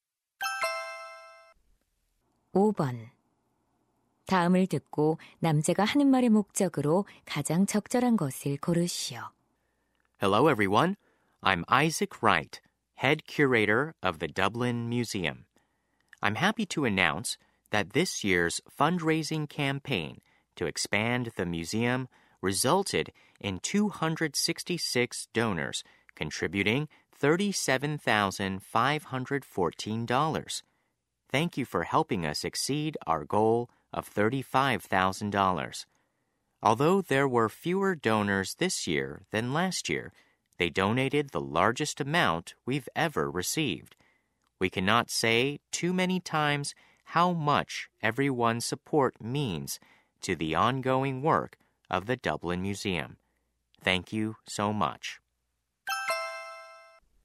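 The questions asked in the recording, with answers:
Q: 다음을 듣고 남자가 하는 말의 목적으로 가장 적절한 것을 고르시오.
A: 박물관 모금 캠페인 결과를 알리고 감사하려고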